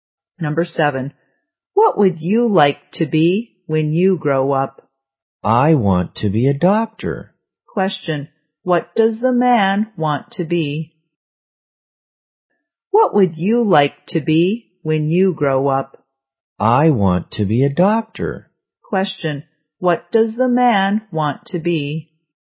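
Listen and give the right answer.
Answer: A doctor.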